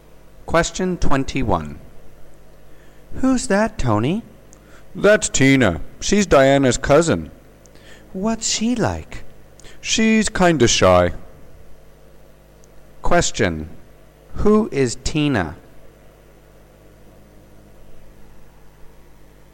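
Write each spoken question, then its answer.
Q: Who is Tina?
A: Diana's cousin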